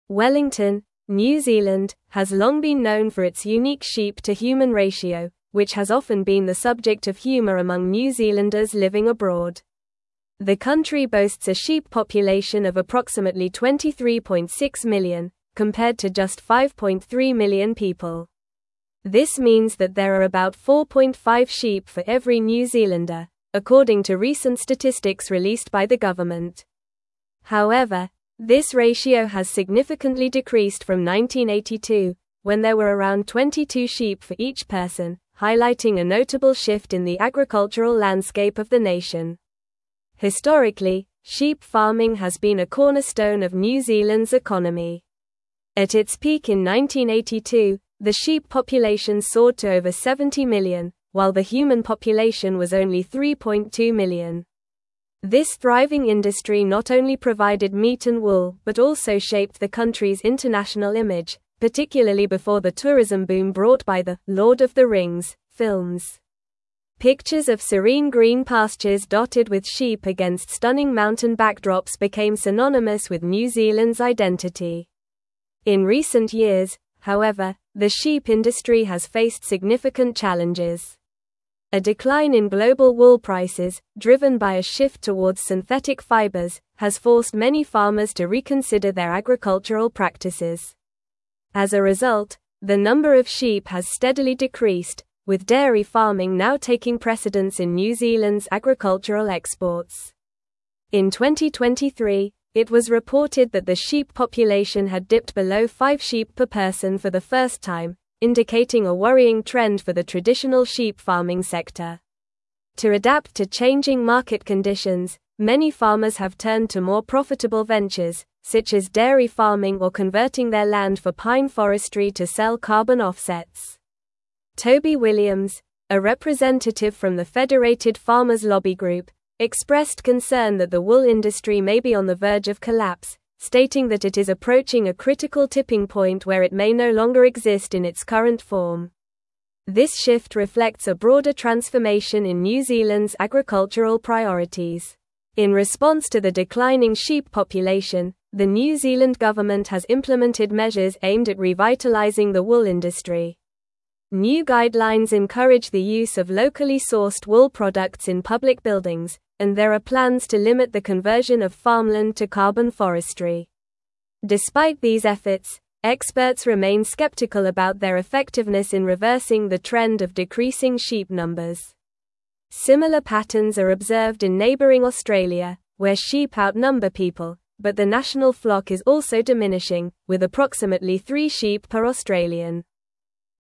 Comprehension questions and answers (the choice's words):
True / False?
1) The sheep population in New Zealand has not notably decreased since 1982, when there were about 22 sheep per person.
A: False

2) Experts are optimistic about the effectiveness of government efforts to reverse the trend of decreasing sheep numbers in New Zealand.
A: False

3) Wellington, New Zealand, has a sheep population of approximately 23.6 million compared to 5.3 million people.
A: True

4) The New Zealand government has not introduced measures to revitalize the wool industry, including encouraging the use of locally sourced wool products.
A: False

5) The decline in global wool prices has led many farmers to shift towards dairy farming and other ventures.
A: True

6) The sheep-to-human ratio in New Zealand is not approximately 4.5 sheep per person.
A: False

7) Historically, sheep farming has been a key component of New Zealand's economy.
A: True

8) In 1982, New Zealand's sheep population peaked at over 70 million.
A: True

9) Wellington, New Zealand, has long been (1)______ for its unique sheep-to-human ratio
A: known

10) which has often been the subject of humor among New Zealanders (2)______ abroad.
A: living

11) according to recent statistics (3)______ by the government.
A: released

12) highlighting a notable (4)______ in the agricultural landscape of the nation.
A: shift

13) but also shaped the country's international (5)______, particularly before the tourism boom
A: image

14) Pictures of serene green pastures dotted with (6)______ against stunning mountain backdrops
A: sheep

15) A (7)______ in global wool prices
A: decline

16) driven by a shift towards synthetic (8)______, has forced many farmers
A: fibers

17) (9)______ a worrying trend for the traditional sheep farming sector.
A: indicating

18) To adapt to changing (10)______ conditions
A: market

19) many (11)______ have turned to more profitable ventures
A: farmers

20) Toby Williams, a (12)______ from the Federated Farmers lobby group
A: representative

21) the New Zealand government has implemented (13)______ aimed at revitalizing the wool industry.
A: measures

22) the use of locally sourced wool products in public (14)______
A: buildings

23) plans to limit the conversion of farmland to carbon (15)______.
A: forestry

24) Similar patterns are (16)______ in neighboring Australia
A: observed

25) What is the sheep population in New Zealand as mentioned in the article?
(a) Approximately 30 million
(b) Approximately 15 million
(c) Approximately 23.6 million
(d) Approximately 40 million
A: Approximately 23.6 million

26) How many people live in New Zealand according to the article?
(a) Approximately 4 million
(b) Approximately 6 million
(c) Approximately 5.3 million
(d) Approximately 7 million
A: Approximately 5.3 million

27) What was the sheep-to-human ratio in New Zealand in 1982?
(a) About 10 sheep for each person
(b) About 15 sheep for each person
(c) About 30 sheep for each person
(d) About 22 sheep for each person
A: About 22 sheep for each person

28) What has been a significant challenge for the sheep industry in recent years?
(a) Increase in sheep population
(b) Decline in global wool prices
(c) Rise in demand for sheep meat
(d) Lack of farmland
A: Decline in global wool prices

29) What agricultural practice has taken precedence over sheep farming in New Zealand?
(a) Vegetable farming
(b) Dairy farming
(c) Poultry farming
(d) Fish farming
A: Dairy farming

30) What measures has the New Zealand government implemented to support the wool industry?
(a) Encouraging the use of locally sourced wool products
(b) Subsidizing sheep farmers directly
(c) Banning synthetic fibers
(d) Increasing sheep imports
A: Encouraging the use of locally sourced wool products

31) What is the current sheep population per person in New Zealand as reported in 2023?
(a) About ten sheep per person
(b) About three sheep per person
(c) About seven sheep per person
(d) Below five sheep per person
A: Below five sheep per person

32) What concern did Toby Williams express regarding the wool industry?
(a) It may be on the verge of collapse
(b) It is thriving and expanding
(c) It has no competition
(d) It is becoming more profitable than dairy farming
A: It may be on the verge of collapse

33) What is the current sheep-to-human ratio in New Zealand according to recent statistics?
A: The current sheep-to-human ratio in New Zealand is about 4.5 sheep for every New Zealander.

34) How has the sheep population in New Zealand changed since 1982?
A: Since 1982, the sheep population in New Zealand has significantly decreased from around 70 million to approximately 23.6 million.

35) What impact did the sheep farming industry have on New Zealand's international image before the tourism boom?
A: Before the tourism boom, the sheep farming industry shaped New Zealand's international image by creating picturesque images of serene green pastures dotted with sheep against stunning mountain backdrops.

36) What challenges has the sheep industry faced in recent years, and what has contributed to these challenges?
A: The sheep industry has faced challenges due to a decline in global wool prices driven by a shift towards synthetic fibers, forcing many farmers to reconsider their agricultural practices.

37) How have farmers adapted to the changing market conditions in New Zealand's agricultural sector?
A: Farmers have adapted by turning to more profitable ventures like dairy farming or converting their land for pine forestry to sell carbon offsets.

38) What measures has the New Zealand government implemented to support the wool industry in light of the declining sheep population?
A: The New Zealand government has implemented measures such as encouraging the use of locally sourced wool products in public buildings and plans to limit the conversion of farmland to carbon forestry.

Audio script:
Wellington, New Zealand, has long been known for its unique sheep-to-human ratio, which has often been the subject of humor among New Zealanders living abroad. The country boasts a sheep population of approximately 23.6 million, compared to just 5.3 million people. This means that there are about 4.5 sheep for every New Zealander, according to recent statistics released by the government. However, this ratio has significantly decreased from 1982, when there were around 22 sheep for each person, highlighting a notable shift in the agricultural landscape of the nation.
Historically, sheep farming has been a cornerstone of New Zealand's economy. At its peak in 1982, the sheep population soared to over 70 million, while the human population was only 3.2 million. This thriving industry not only provided meat and wool but also shaped the country's international image, particularly before the tourism boom brought by the "Lord of the Rings" films. Pictures of serene green pastures dotted with sheep against stunning mountain backdrops became synonymous with New Zealand's identity.
In recent years, however, the sheep industry has faced significant challenges. A decline in global wool prices, driven by a shift towards synthetic fibers, has forced many farmers to reconsider their agricultural practices. As a result, the number of sheep has steadily decreased, with dairy farming now taking precedence in New Zealand's agricultural exports. In 2023, it was reported that the sheep population had dipped below five sheep per person for the first time, indicating a worrying trend for the traditional sheep farming sector.
To adapt to changing market conditions, many farmers have turned to more profitable ventures, such as dairy farming or converting their land for pine forestry to sell carbon offsets. Toby Williams, a representative from the Federated Farmers lobby group, expressed concern that the wool industry may be on the verge of collapse, stating that it is approaching a critical tipping point where it may no longer exist in its current form. This shift reflects a broader transformation in New Zealand's agricultural priorities.
In response to the declining sheep population, the New Zealand government has implemented measures aimed at revitalizing the wool industry. New guidelines encourage the use of locally sourced wool products in public buildings, and there are plans to limit the conversion of farmland to carbon forestry. Despite these efforts, experts remain skeptical about their effectiveness in reversing the trend of decreasing sheep numbers. Similar patterns are observed in neighboring Australia, where sheep outnumber people, but the national flock is also diminishing, with approximately three sheep per Australian.

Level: Level 4